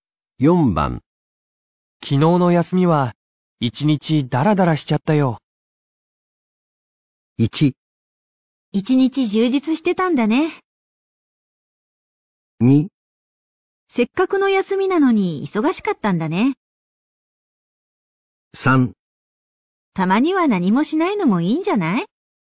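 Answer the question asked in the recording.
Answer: 3: たまには何もしないのもいいんじゃない?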